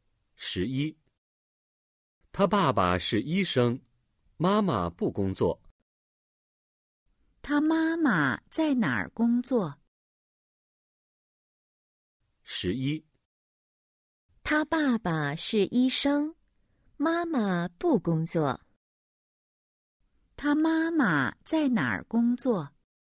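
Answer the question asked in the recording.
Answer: 她不工作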